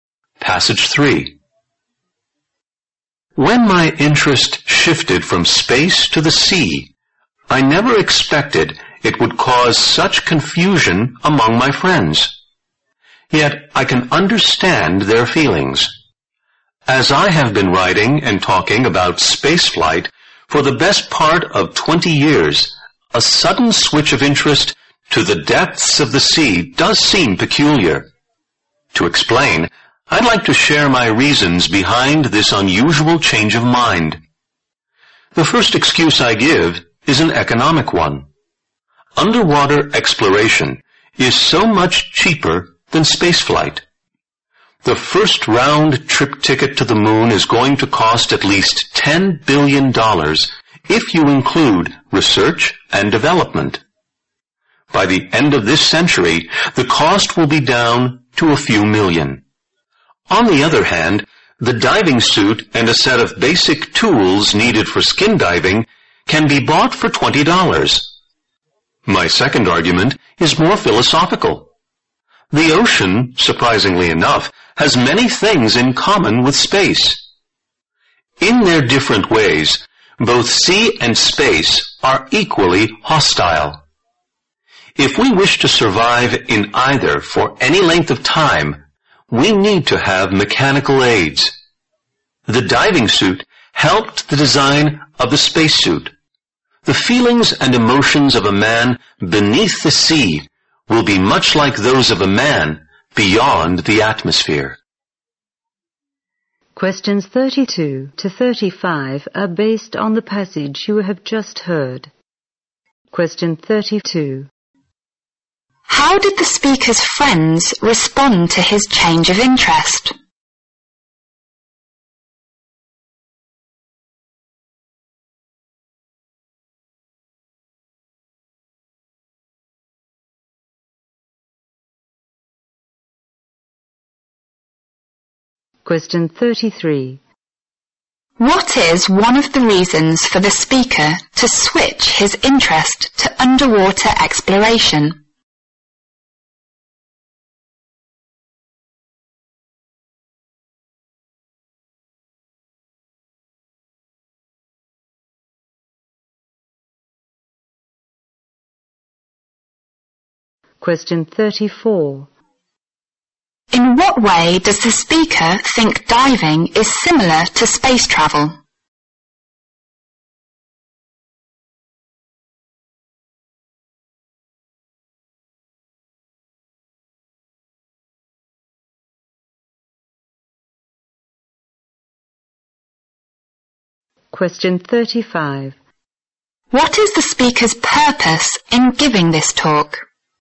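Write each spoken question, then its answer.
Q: How did the speaker's friends respond to his change of interest?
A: They were confused

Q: What is one of the reasons for the speaker to switch his interest to underwater exploration?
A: It is much cheaper than spaceflight

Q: In what way does the speaker think diving is similar to space travel?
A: Both environments are hostile and need mechanical aids

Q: What is the speaker's purpose in giving this talk?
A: To explain why he changed his interest from space to the sea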